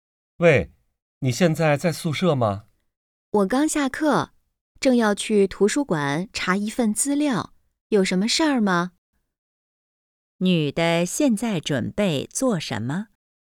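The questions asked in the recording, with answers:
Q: 女的现在准备做什么?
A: 去图书馆查资料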